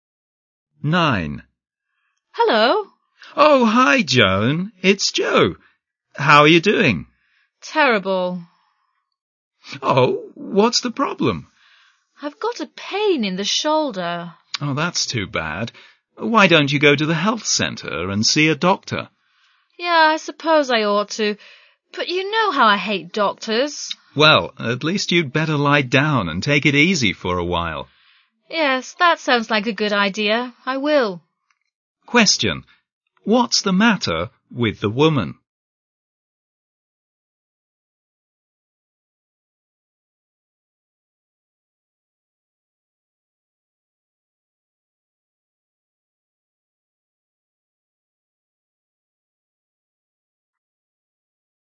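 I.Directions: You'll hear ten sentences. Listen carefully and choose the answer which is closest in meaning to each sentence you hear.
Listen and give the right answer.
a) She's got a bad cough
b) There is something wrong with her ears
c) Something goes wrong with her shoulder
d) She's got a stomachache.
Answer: c) Something goes wrong with her shoulder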